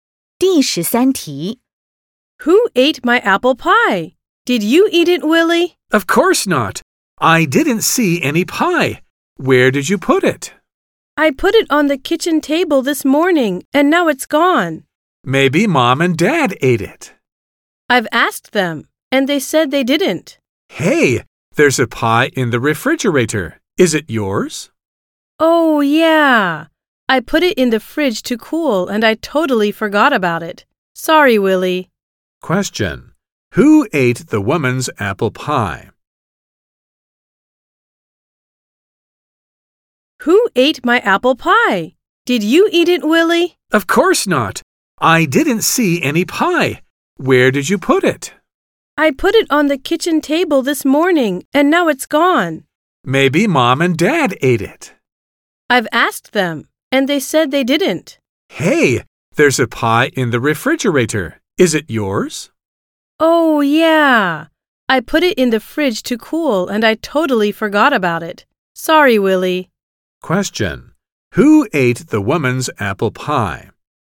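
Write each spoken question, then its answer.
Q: Who ate the woman's apple pie?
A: Nobody; she put it in the fridge and forgot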